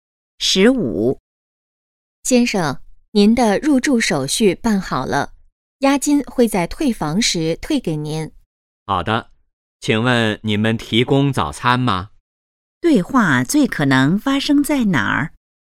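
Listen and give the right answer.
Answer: 酒店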